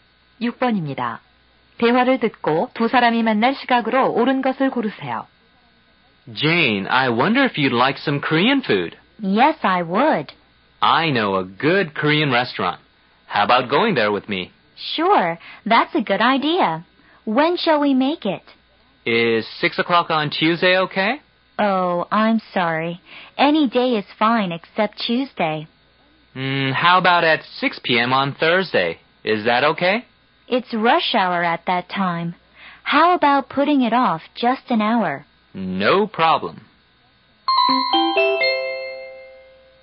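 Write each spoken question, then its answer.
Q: 대화를 듣고 두 사람이 만날 시각으로 옳은 것을 고르세요.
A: 목요일 오후 7시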